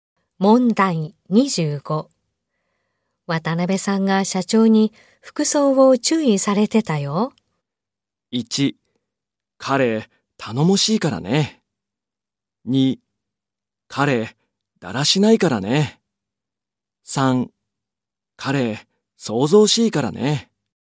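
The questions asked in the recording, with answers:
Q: 渡辺さんが社長に服装を注意されてたよ。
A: 2: 彼、だらしないからね。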